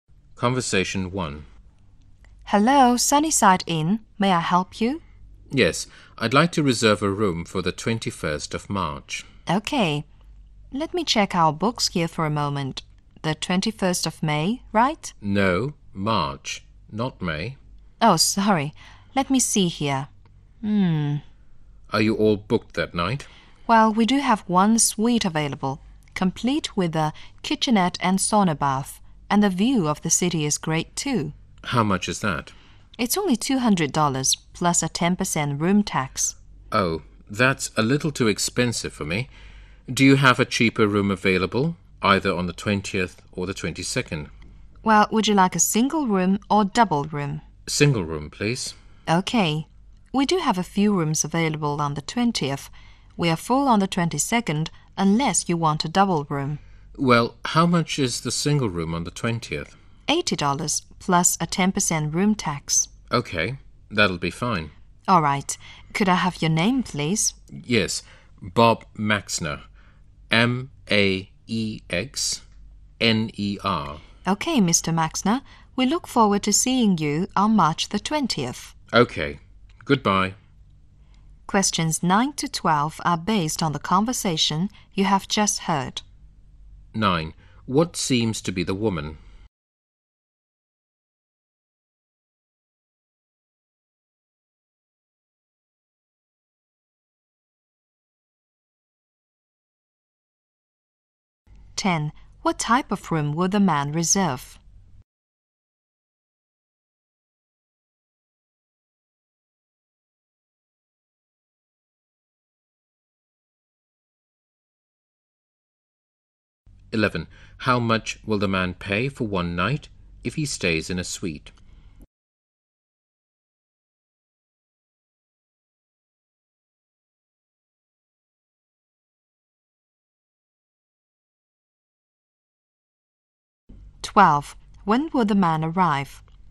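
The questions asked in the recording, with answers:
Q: What seems to be the woman?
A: A hotel receptionist

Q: What type of room will the man reserve?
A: A single room

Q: How much will the man pay for one night if he stays in a suite?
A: $220

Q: When will the man arrive?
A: On March 20th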